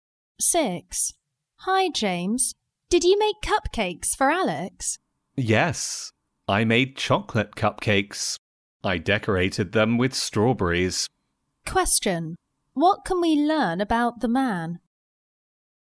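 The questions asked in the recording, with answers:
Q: What can we learn about the man?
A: He made chocolate cupcakes decorated with strawberries for Alex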